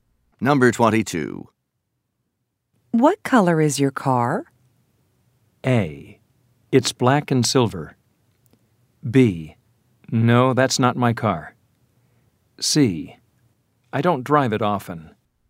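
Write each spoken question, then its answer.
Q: What color is your car?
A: A: It's black and silver.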